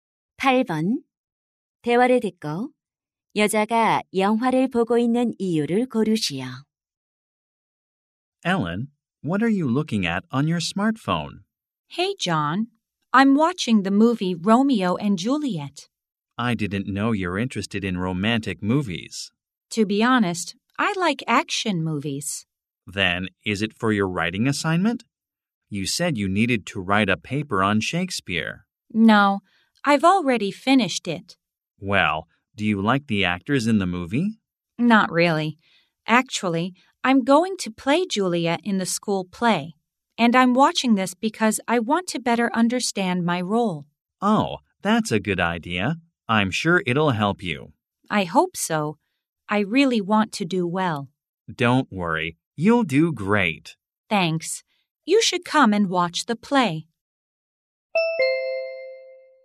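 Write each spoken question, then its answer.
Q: 대화를 듣고 여자가 영화를 보고 있는 이유를 고르시오.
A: 학교 연극에서 맡은 줄리엣 역할을 더 잘 이해하려고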